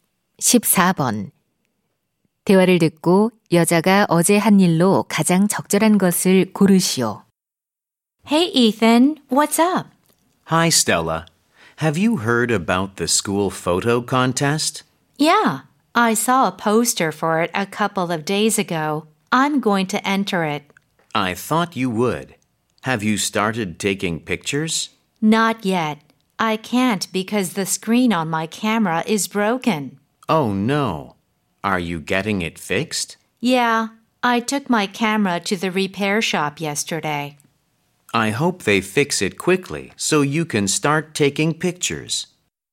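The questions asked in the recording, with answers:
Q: 대화를 듣고 여자가 어제 한 일로 가장 적절한 것을 고르시오.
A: 카메라를 수리점에 맡김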